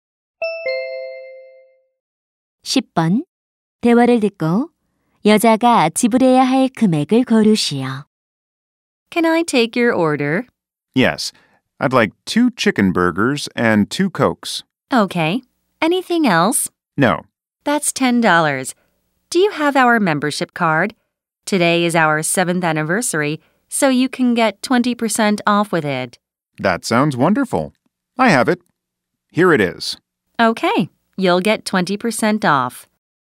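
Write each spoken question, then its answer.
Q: 대화를 듣고 여자가 지불해야 할 금액을 고르시오.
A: 8달러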